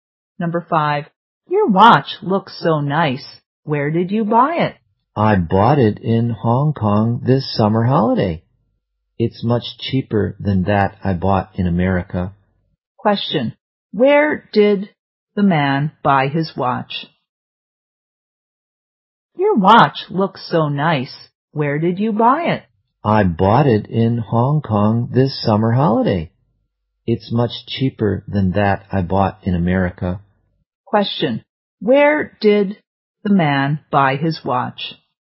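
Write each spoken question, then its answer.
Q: where did the man buy his watch?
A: In Hong Kong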